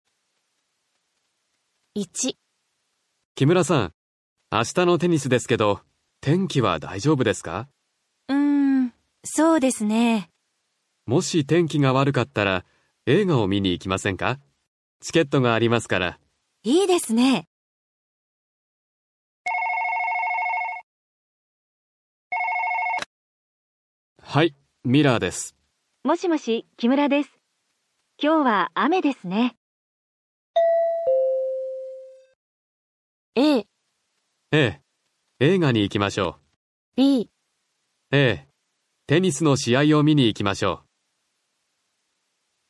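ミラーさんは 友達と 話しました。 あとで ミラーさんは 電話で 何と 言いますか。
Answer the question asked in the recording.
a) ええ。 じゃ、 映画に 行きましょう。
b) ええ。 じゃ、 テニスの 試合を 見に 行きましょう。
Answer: a) ええ。 じゃ、 映画に 行きましょう。

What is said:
天気は 大丈夫ですか。
B: うーん、 そうですね...。
A: もし、 天気が 悪かったら、 映画を 見に 行きませんか。チケットが ありますから。
B: いいですね。
A: はい、 ミラーです。
B: もしもし、 木村です。 今日は 雨ですね。
A: a. ええ。 じゃ、 映画に 行きましょう。

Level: N5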